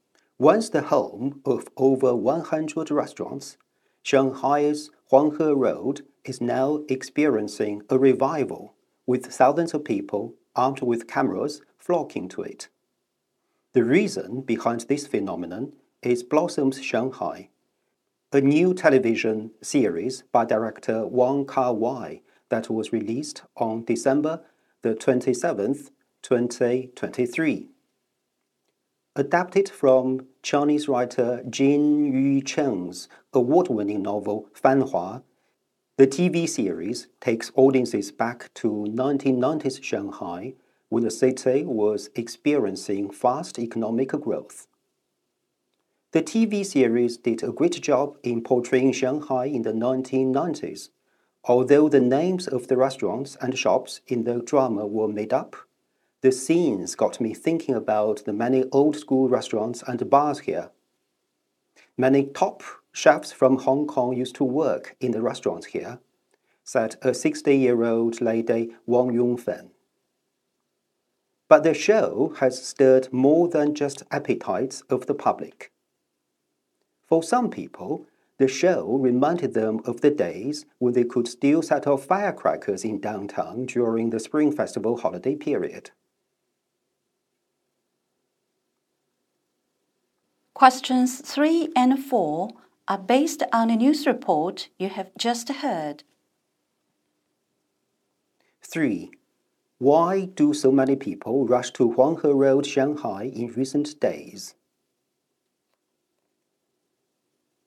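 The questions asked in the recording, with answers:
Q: Why do so many people rush to Huanghe Road, Shanghai in recent days?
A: Because of the TV series Blossoms Shanghai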